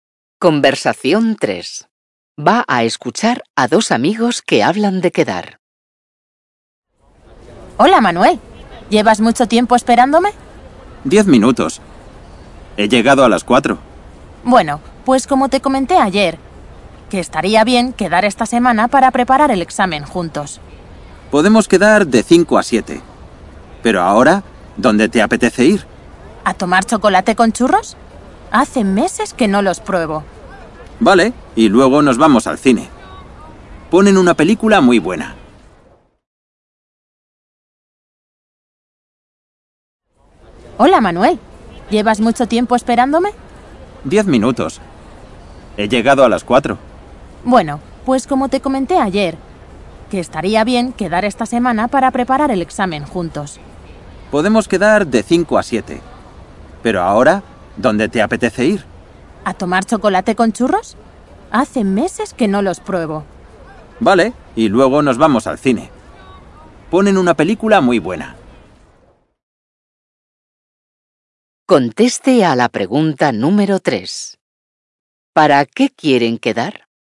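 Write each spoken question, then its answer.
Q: ¿Para qué quieren quedar?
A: Para preparar el examen juntos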